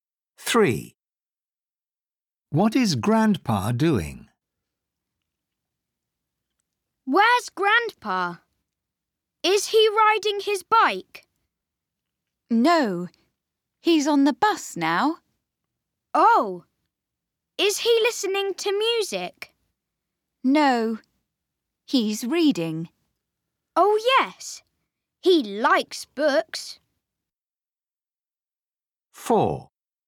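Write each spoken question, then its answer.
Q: What is Grandpa doing?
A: Reading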